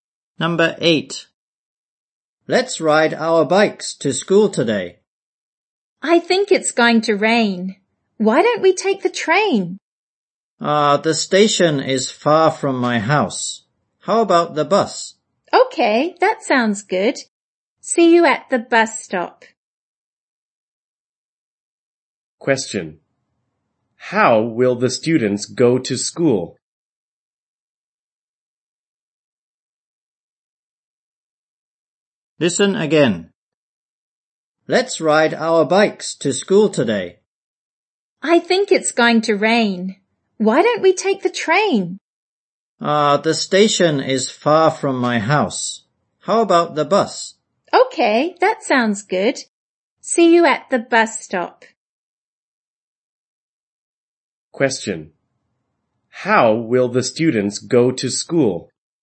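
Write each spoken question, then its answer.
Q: How will the students go to school?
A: By bus.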